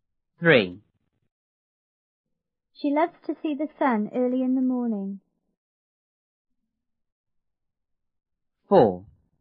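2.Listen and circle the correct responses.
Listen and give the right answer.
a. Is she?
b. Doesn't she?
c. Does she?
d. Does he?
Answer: c. Does she?

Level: 六年级下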